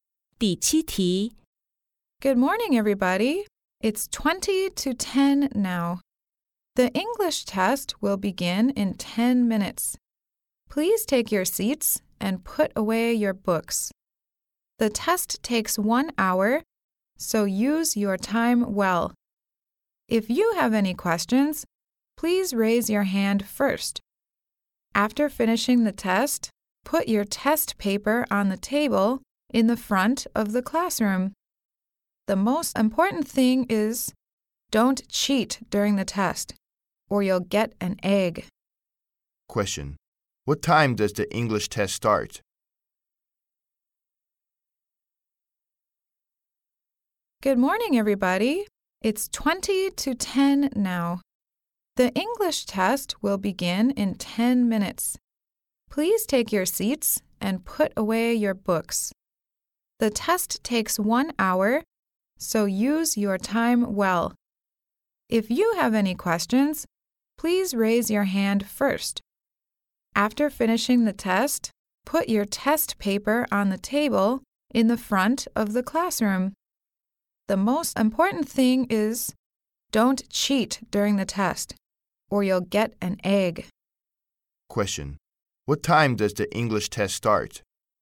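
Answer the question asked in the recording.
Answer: At 10 o'clock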